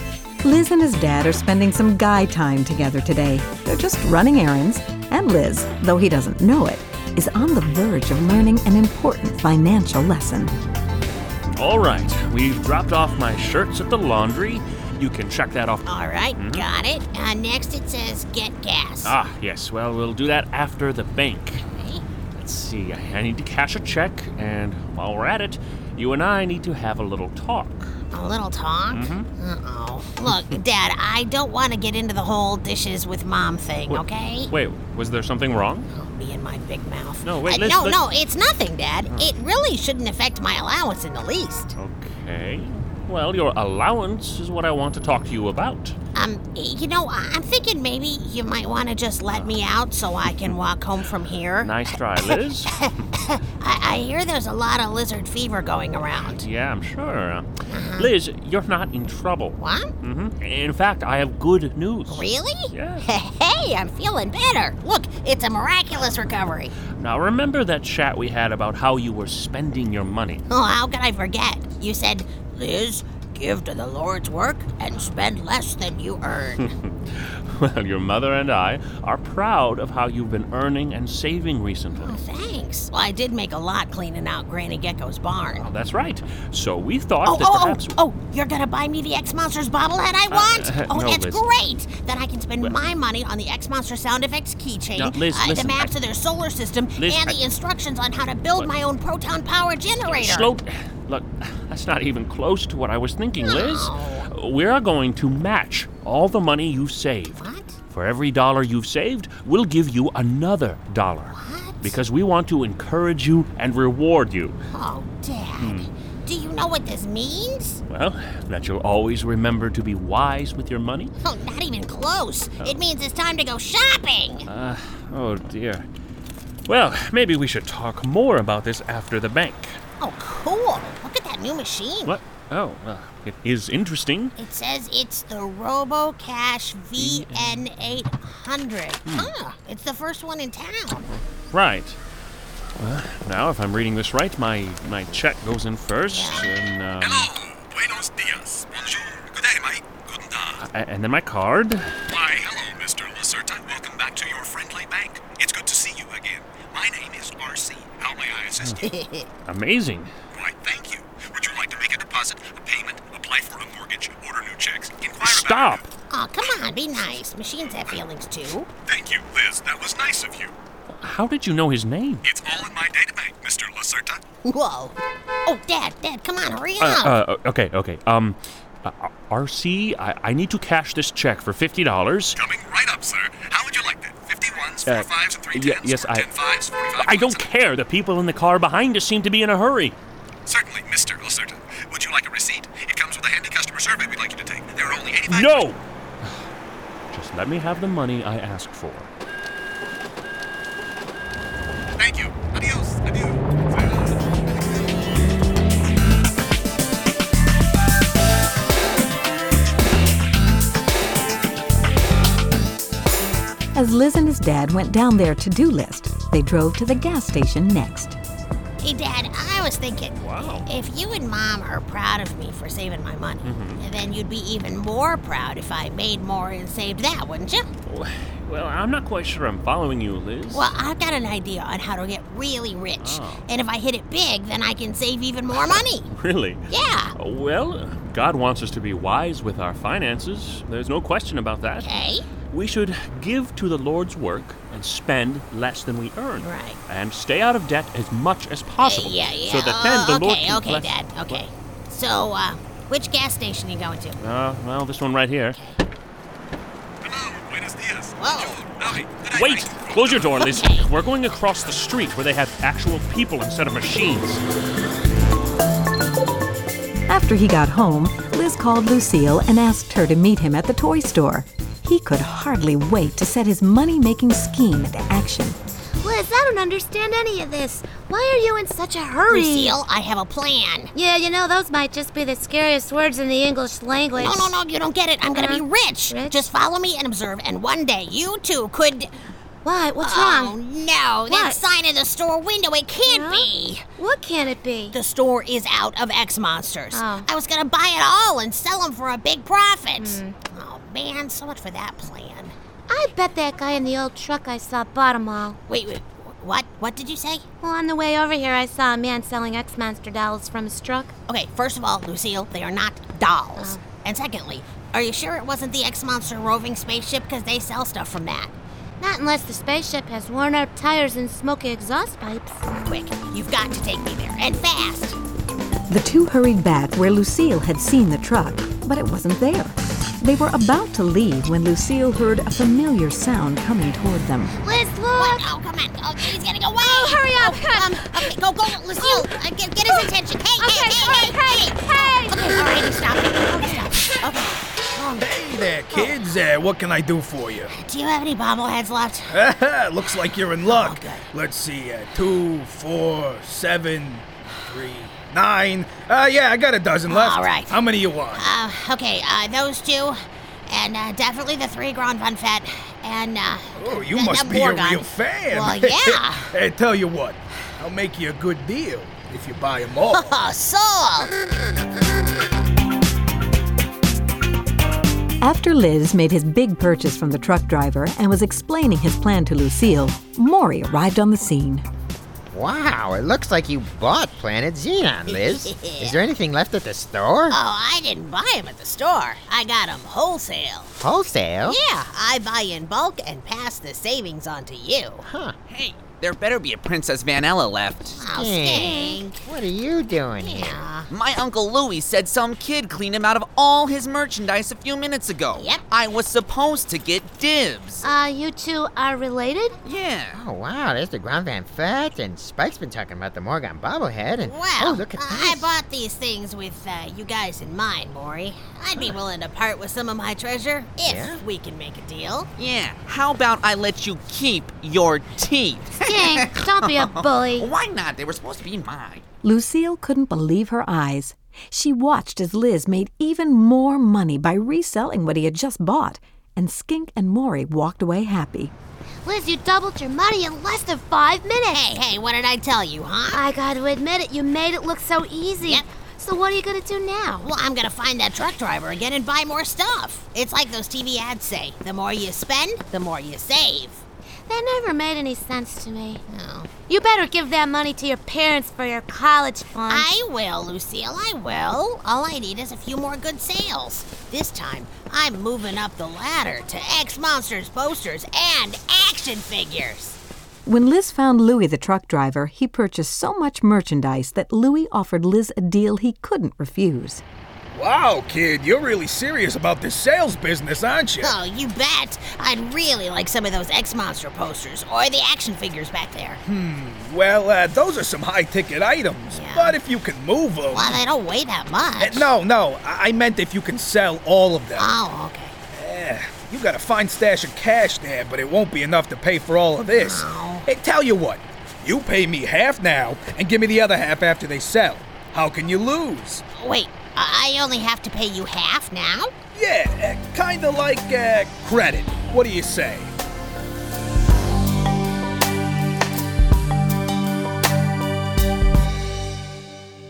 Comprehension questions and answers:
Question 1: What was the deal that Liz's dad offered him to encourage him to save his money?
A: He would match whatever he saved, putting an equal amount in his savings account.

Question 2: What does Liz do in order to make more money?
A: He decides to buy X-Monsters stuff and resell it at a profit.

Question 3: Where does he get the X-Monsters stuff to sell?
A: From Skink's uncle.